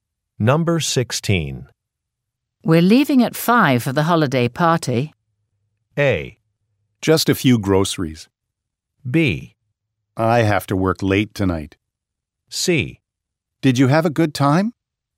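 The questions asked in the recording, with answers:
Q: We're leaving at 5 for the holiday party.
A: B: I have to work late tonight.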